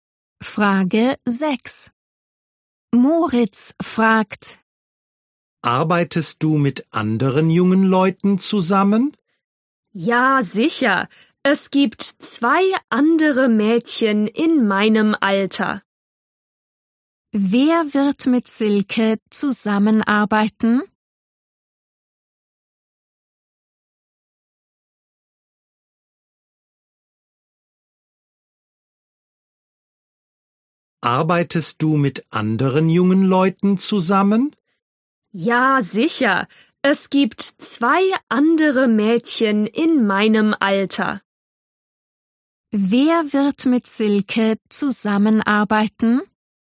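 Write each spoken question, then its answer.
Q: Wer wird mit Silke zusammenarbeiten?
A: Zwei andere Mädchen in ihrem Alter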